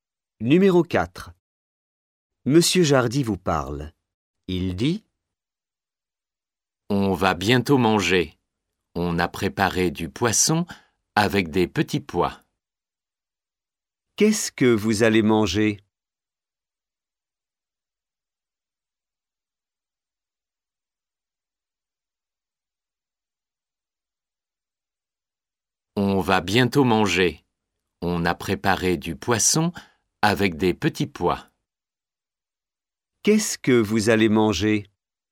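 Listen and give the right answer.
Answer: Du poisson avec des petits pois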